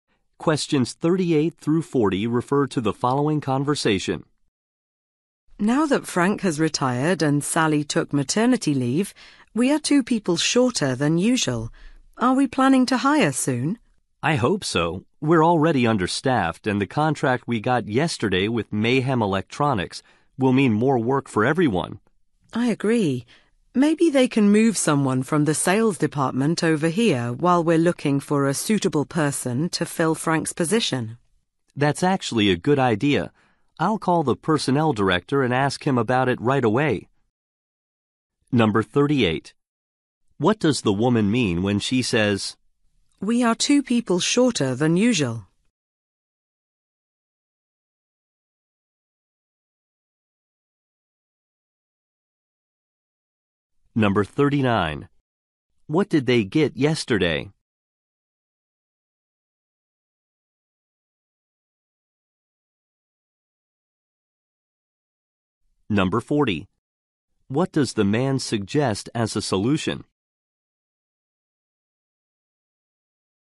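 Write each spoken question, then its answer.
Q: What does the woman mean when she says,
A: They are understaffed

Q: What did they get yesterday?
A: A contract with Mayhem Electronics

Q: What does the man suggest as a solution?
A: Moving someone from the sales department temporarily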